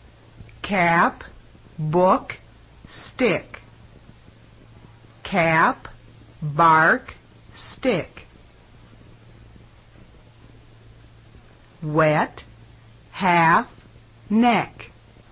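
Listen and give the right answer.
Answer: bark (it should have been book)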